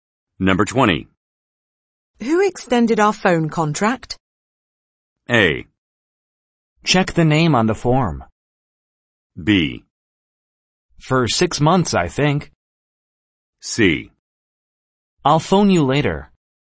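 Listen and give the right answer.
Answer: A: Check the name on the form.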